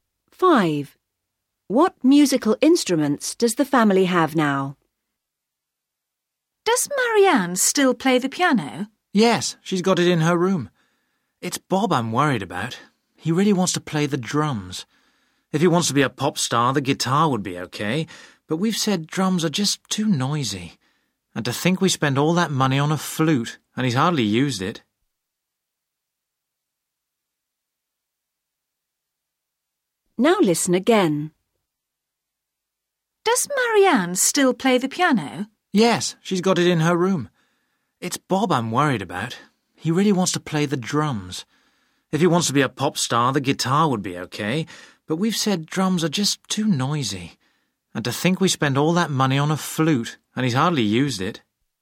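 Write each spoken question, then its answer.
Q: What musical instruments does the family have now?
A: A piano and a flute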